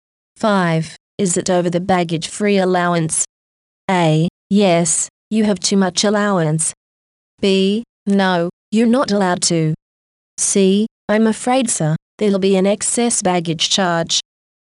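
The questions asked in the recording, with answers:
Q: Is it over the baggage free allowance?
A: C: I'm afraid, sir, there'll be an excess baggage charge.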